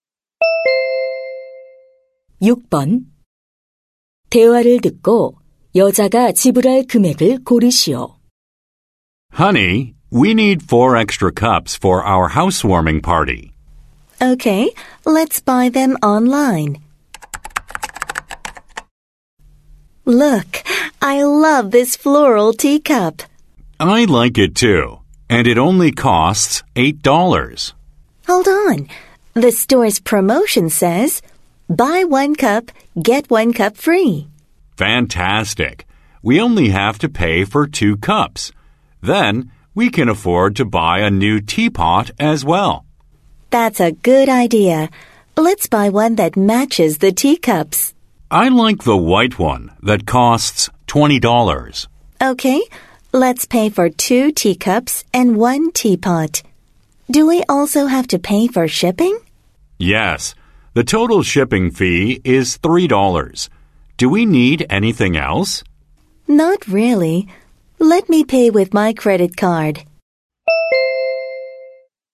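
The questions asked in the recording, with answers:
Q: 대화를 듣고 여자가 지불할 금액을 고르시오.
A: $39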